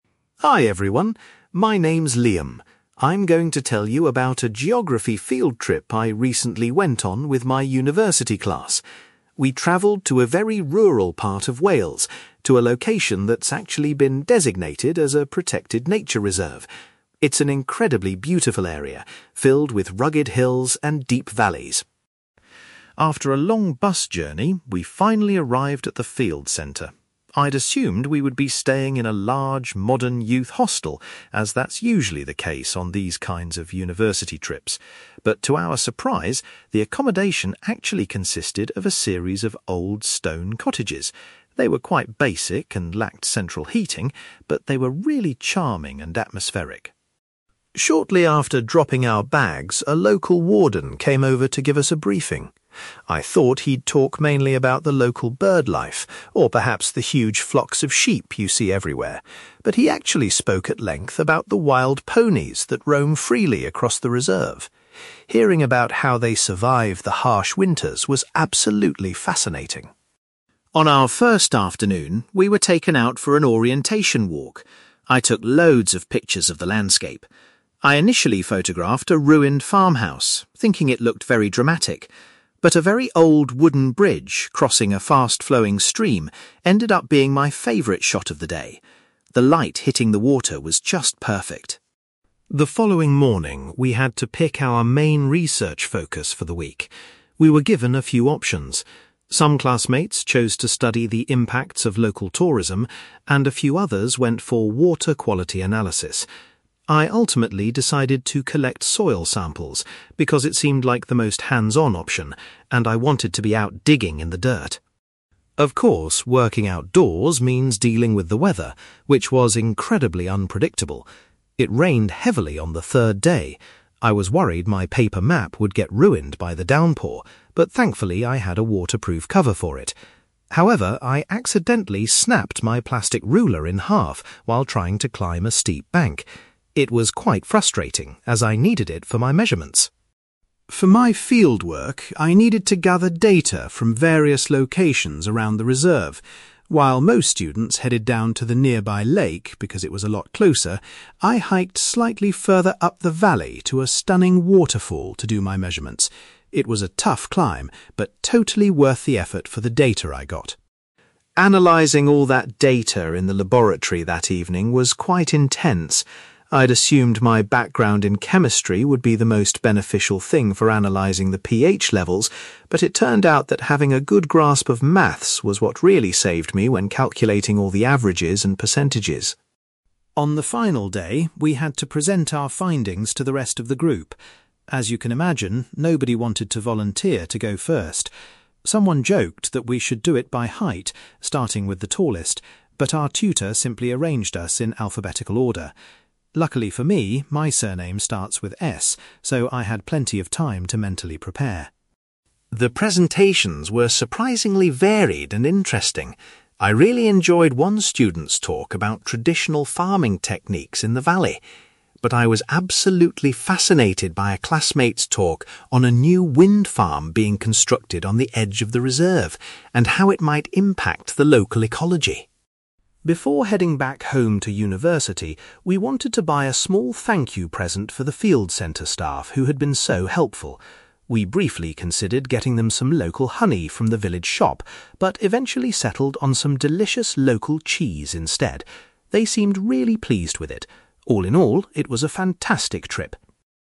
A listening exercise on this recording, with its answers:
You will hear a young man called Liam talking about a geography field trip to a nature reserve in Wales. For questions 9-18, complete the sentences with a word or short phrase.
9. Liam was surprised to find that his group would be sleeping in (9)........................... instead of a large hostel.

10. During the introductory talk, the warden focused his talk on the (10)........................... living in the area.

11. The best photograph Liam took during his initial walk was of a (11)........................... .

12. For his main research assignment, Liam chose to gather (12)........................... .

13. Liam was annoyed when his (13)........................... broke during the bad weather.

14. Liam hiked further up the valley to a (14)........................... to conduct his data collection.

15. When analyzing data, Liam realised that his knowledge of (15)........................... was highly valuable.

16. The tutor decided that the students would give their presentations in (16)........................... .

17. Liam was most interested in a presentation about a nearby (17)........................... .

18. The students gave the staff some (18)........................... as a departing gift.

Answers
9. stone cottages
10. wild ponies
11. wooden bridge
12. soil samples
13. plastic ruler
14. waterfall
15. maths
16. alphabetical order
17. wind farm
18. local cheese

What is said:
Liam: Hi everyone, my name's Liam. I'm going to tell you about a geography field trip I recently went on with my university class. We travelled to a very rural part of Wales, to a location that's actually been designated as a protected nature reserve. It's an incredibly beautiful area, filled with rugged hills and deep valleys.
After a long bus journey, we finally arrived at the field centre. I'd assumed we would be staying in a large, modern youth hostel, as that's usually the case on these kinds of university trips. But to our surprise, the accommodation actually consisted of a series of old stone cottages. They were quite basic and lacked central heating, but they were really charming and atmospheric.
Shortly after dropping our bags, a local warden came over to give us a briefing. I thought he'd talk mainly about the local birdlife, or perhaps the huge flocks of sheep you see everywhere. But he actually spoke at length about the wild ponies that roam freely across the reserve. Hearing about how they survive the harsh winters was absolutely fascinating.
On our first afternoon, we were taken out for an orientation walk. I took loads of pictures of the landscape. I initially photographed a ruined farmhouse, thinking it looked very dramatic, but a very old wooden bridge crossing a fast-flowing stream ended up being my favourite shot of the day. The light hitting the water was just perfect.
The following morning, we had to pick our main research focus for the week. We were given a few options. Some classmates chose to study the impacts of local tourism, and a few others went for water quality analysis. I ultimately decided to collect soil samples because it seemed like the most hands-on option, and I wanted to be out digging in the dirt!
Of course, working outdoors means dealing with the weather, which was incredibly unpredictable. It rained heavily on the third day. I was worried my paper map would get ruined by the downpour, but thankfully I had a waterproof cover for it. However, I accidentally snapped my plastic ruler in half while trying to climb a steep bank. It was quite frustrating as I needed it for my measurements!
For my fieldwork, I needed to gather data from various locations around the reserve. While most students headed down to the nearby lake because it was a lot closer, I hiked slightly further up the valley to a stunning waterfall to do my measurements. It was a tough climb, but totally worth the effort for the data I got.
Analyzing all that data in the laboratory that evening was quite intense. I'd assumed my background in chemistry would be the most beneficial thing for analyzing the pH levels, but it turned out that having a good grasp of maths was what really saved me when calculating all the averages and percentages.
On the final day, we had to present our findings to the rest of the group. As you can imagine, nobody wanted to volunteer to go first. Someone joked that we should do it by height, starting with the tallest, but our tutor simply arranged us in alphabetical order. Luckily for me, my surname starts with 'S', so I had plenty of time to mentally prepare!
The presentations were surprisingly varied and interesting. I really enjoyed one student's talk about traditional farming techniques in the valley. But I was absolutely fascinated by a classmate's talk on a new wind farm being constructed on the edge of the reserve, and how it might impact the local ecology.
Before heading back home to university, we wanted to buy a small thank-you present for the field centre staff who had been so helpful. We briefly considered getting them some local honey from the village shop, but eventually settled on some delicious local cheese instead. They seemed really pleased with it. All in all, it was a fantastic trip.

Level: B2